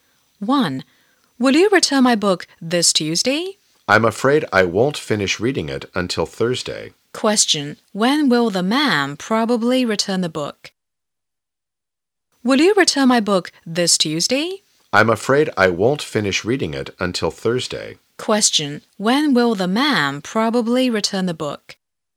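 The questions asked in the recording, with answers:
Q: When will the man probably return the book?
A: On Thursday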